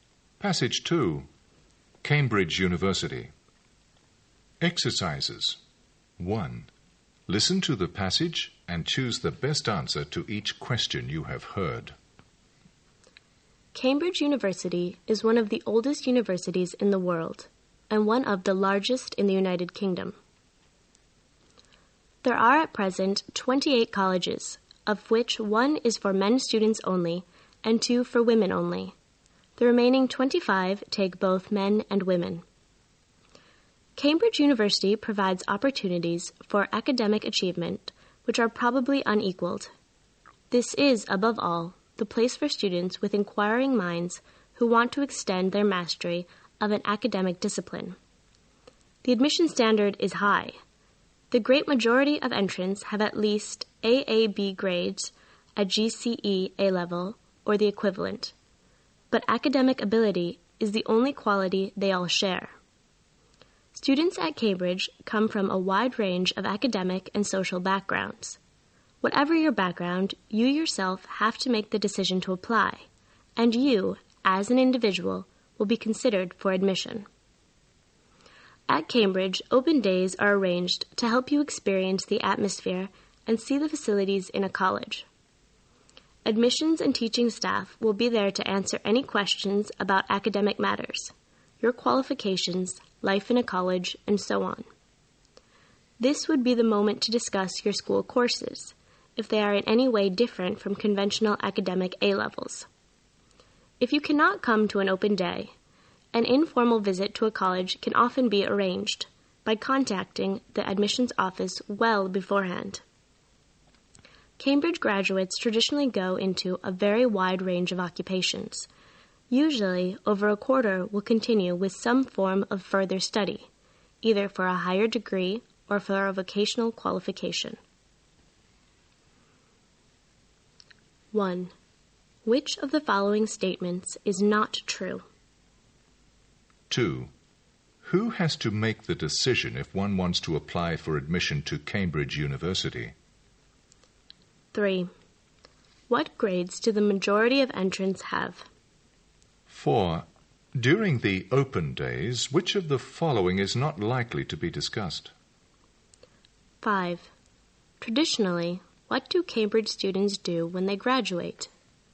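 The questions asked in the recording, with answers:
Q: Who has to make the decision if one wants to apply for admission to Cambridge University?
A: The applicant himself or herself

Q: What grades do the majority of entrants have?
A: At least AAB at GCE A level or equivalent

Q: Traditionally, what do Cambridge students do when they graduate?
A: They go into a very wide range of jobs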